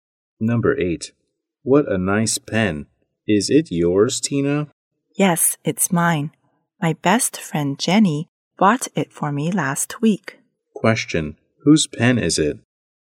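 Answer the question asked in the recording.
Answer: Tina's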